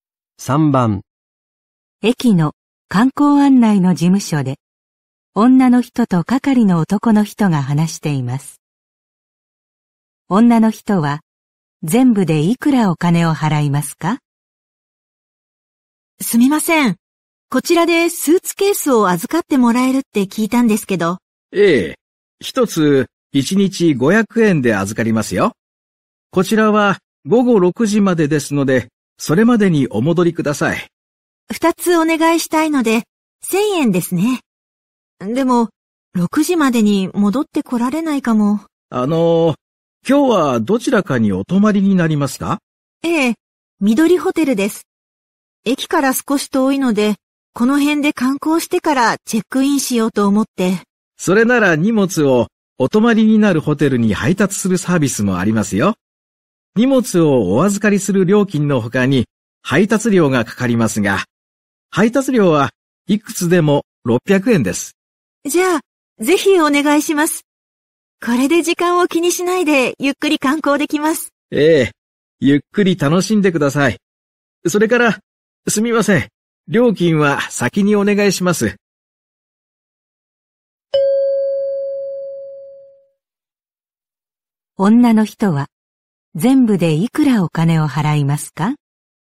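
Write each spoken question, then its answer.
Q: 女の人は全部でいくらお金を払いますか?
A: 1600円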